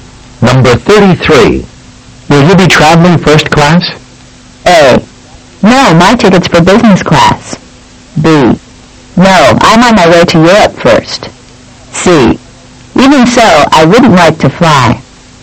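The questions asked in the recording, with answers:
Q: Will you be traveling first class?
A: A: No, my ticket's for business class.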